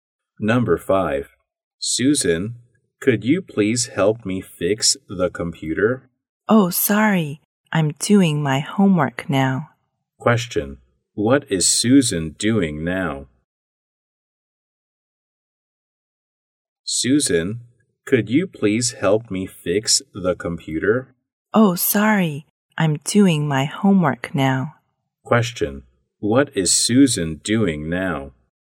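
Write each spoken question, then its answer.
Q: What is Susan doing now?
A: Doing her homework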